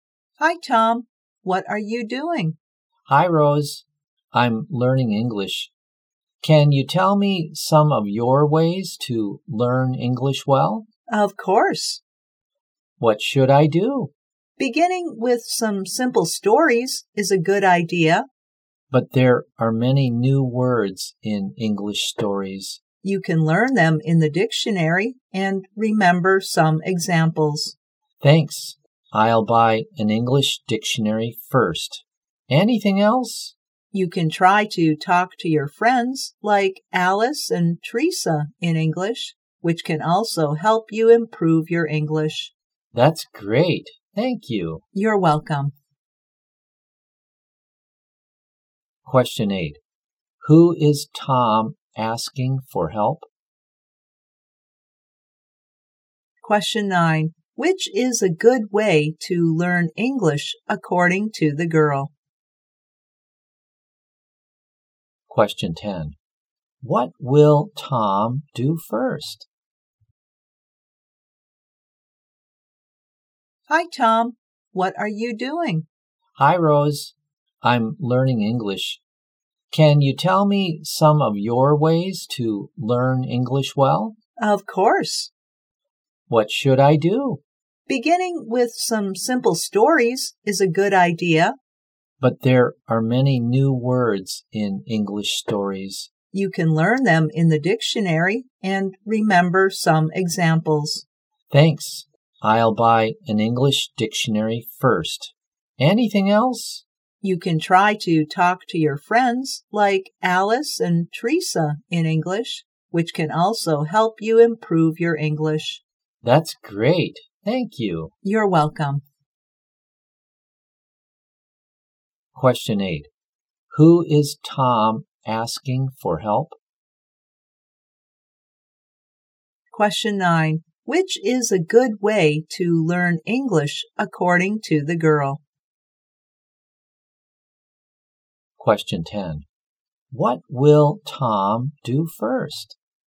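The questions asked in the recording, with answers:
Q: Who is Tom asking for help?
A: Rose.

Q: What will Tom do first?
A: Buy an English dictionary.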